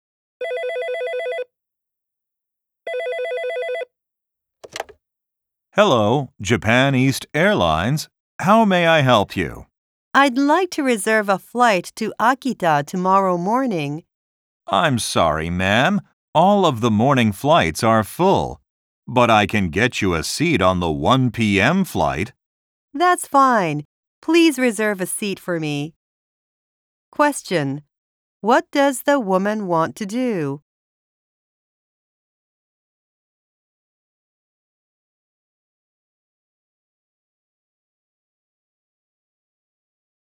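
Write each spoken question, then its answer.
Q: What does the woman want to do?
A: Reserve a flight to Akita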